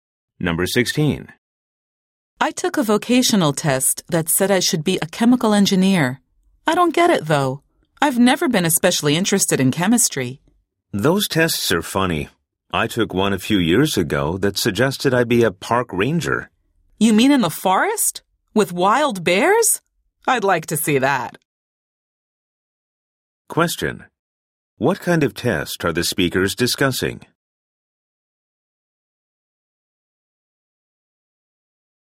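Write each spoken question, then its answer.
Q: What kind of test are the speakers discussing?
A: A vocational test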